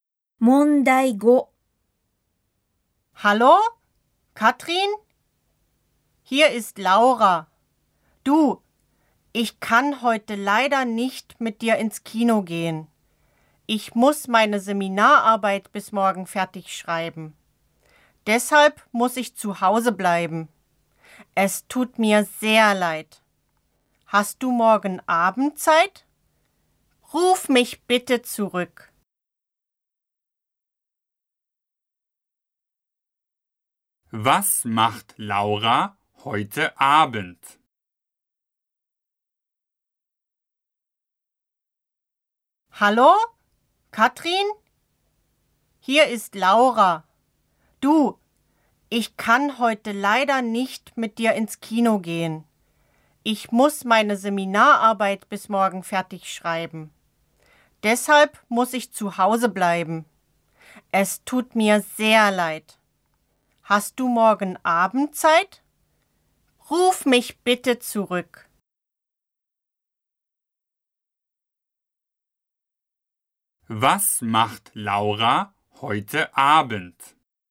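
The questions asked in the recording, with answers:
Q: Was macht Laura heute Abend?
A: Sie schreibt zu Hause ihre Seminararbeit.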